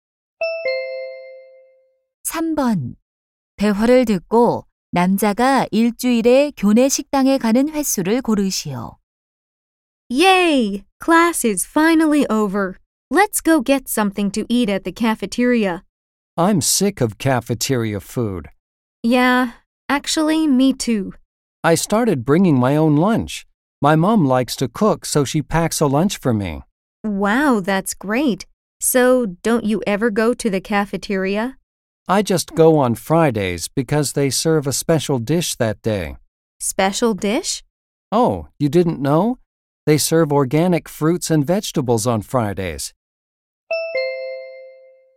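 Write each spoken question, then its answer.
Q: 대화를 듣고 남자가 일주일에 교내 식당에 가는 횟수를 고르시오.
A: 일주일에 한 번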